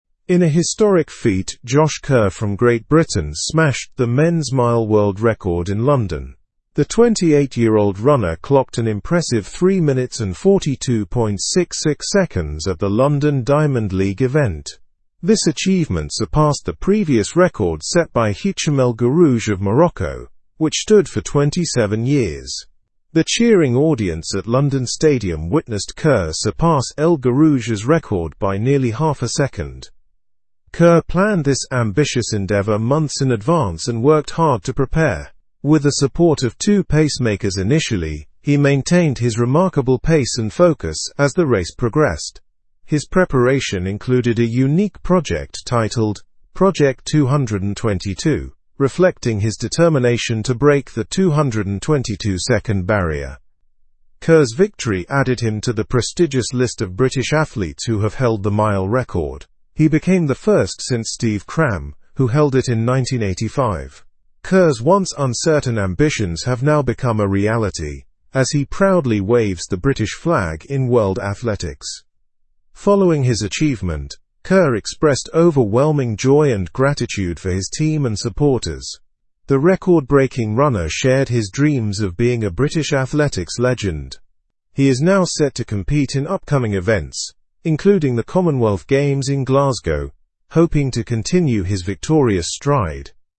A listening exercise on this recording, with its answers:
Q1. Who set a new men's mile world record?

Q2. What was the new record time set by Kerr?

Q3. How long did the previous mile record stand before it was broken?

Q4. What was the name of Kerr's preparation project?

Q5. Who was the last British athlete to hold the mile record before Kerr?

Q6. Where did this record-breaking event take place?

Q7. How did Kerr feel about his achievement?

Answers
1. Josh Kerr set a new men's mile world record.
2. The new record time set by Kerr was 3 minutes and 42.66 seconds.
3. The previous mile record stood for 27 years before it was broken.
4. The name of Kerr's preparation project was 'Project 222.'
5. The last British athlete to hold the mile record before Kerr was Steve Cram.
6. This record-breaking event took place at London Stadium.
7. Kerr felt overwhelming joy and gratitude about his achievement.

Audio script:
In a historic feat, Josh Kerr from Great Britain smashed the men's mile world record in London. The 28-year-old runner clocked an impressive 3 minutes and 42.66 seconds at the London Diamond League event. This achievement surpassed the previous record set by Hicham El Guerrouj of Morocco, which stood for 27 years. The cheering audience at London Stadium witnessed Kerr surpass El Guerrouj's record by nearly half a second.
Kerr planned this ambitious endeavor months in advance and worked hard to prepare. With the support of two pacemakers initially, he maintained his remarkable pace and focus as the race progressed. His preparation included a unique project titled 'Project 222,' reflecting his determination to break the 222-second barrier.
Kerr's victory added him to the prestigious list of British athletes who have held the mile record. He became the first since Steve Cram, who held it in 1985. Kerr's once uncertain ambitions have now become a reality, as he proudly waves the British flag in world athletics.
Following his achievement, Kerr expressed overwhelming joy and gratitude for his team and supporters. The record-breaking runner shared his dreams of being a British athletics legend. He is now set to compete in upcoming events, including the Commonwealth Games in Glasgow, hoping to continue his victorious stride.

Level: Level 3